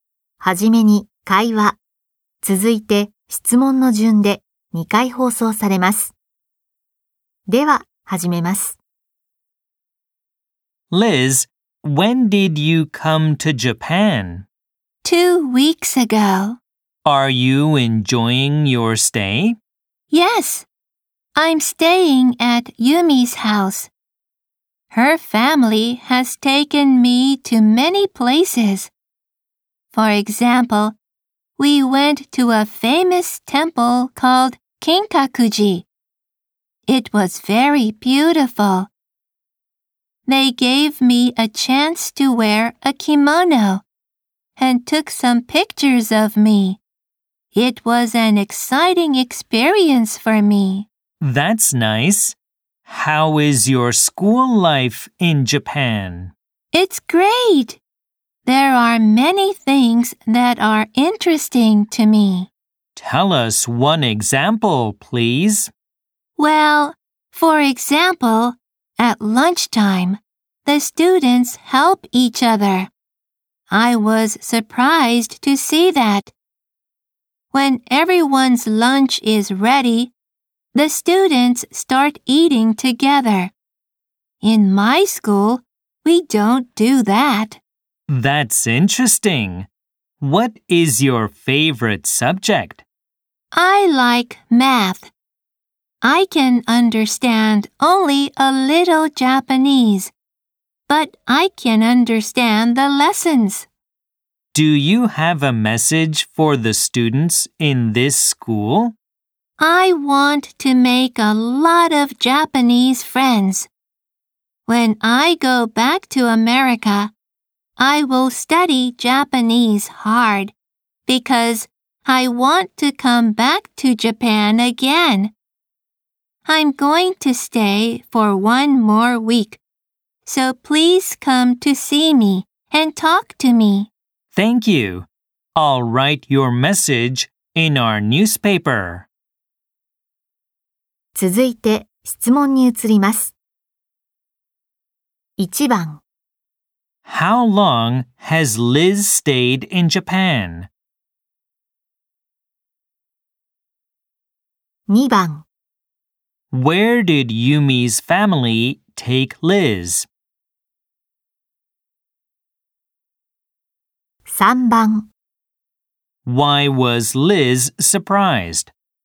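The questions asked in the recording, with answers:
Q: How long has Liz stayed in Japan?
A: For two weeks.

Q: Where did Yumi's family take Liz?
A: To a famous temple called Kinkakuji.

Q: Why was Liz surprised?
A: Because the students help each other at lunchtime.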